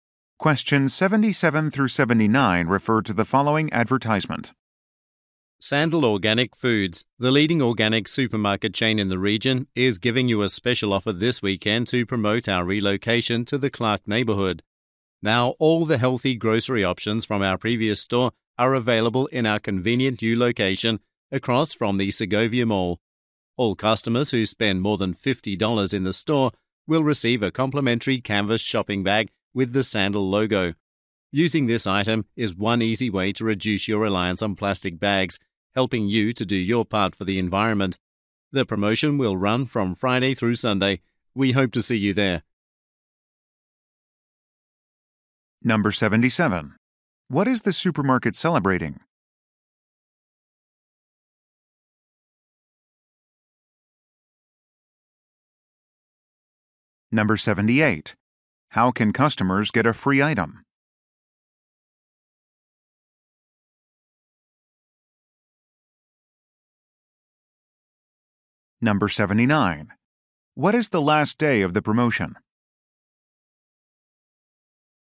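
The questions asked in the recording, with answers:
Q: What is the supermarket celebrating?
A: Its relocation to a new location

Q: How can customers get a free item?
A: By spending more than $50

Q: What is the last day of the promotion?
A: Sunday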